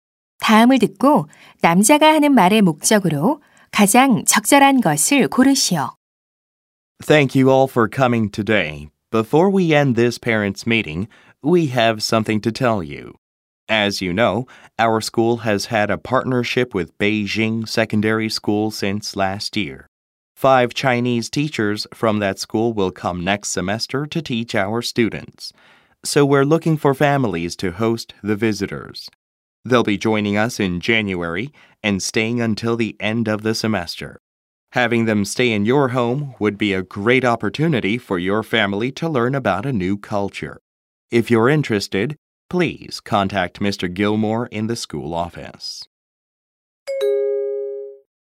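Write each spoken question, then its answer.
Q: 다음을 듣고 남자가 하는 말의 목적으로 가장 적절한 것을 고르시오.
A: 방문하는 중국 교사들을 맞이할 홈스테이 가정을 모집하려고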